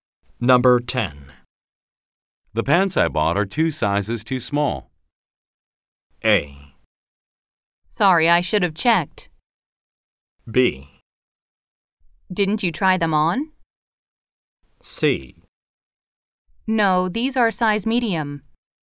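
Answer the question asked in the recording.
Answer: B: Didn't you try them on?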